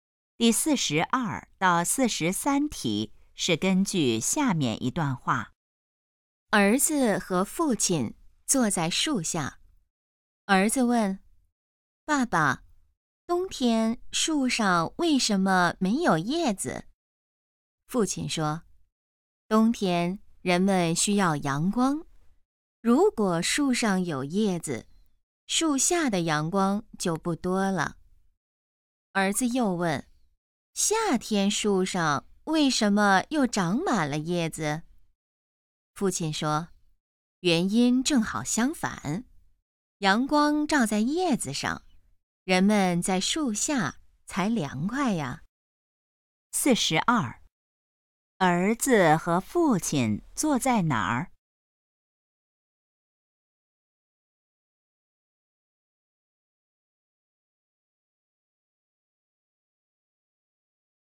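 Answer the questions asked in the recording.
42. 树下
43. 让人们在树下凉快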